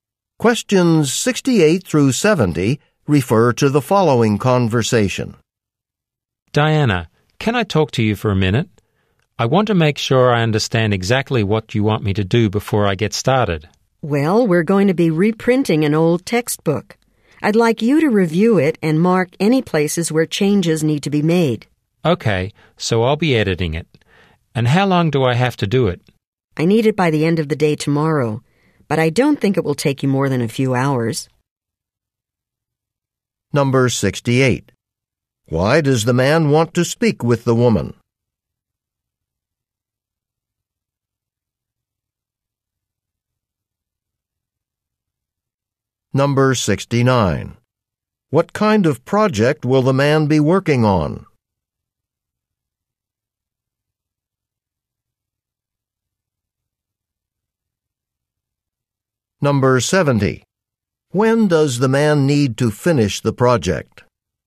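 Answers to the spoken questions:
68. To make sure he understands the assignment
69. Editing a textbook
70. By the end of the day tomorrow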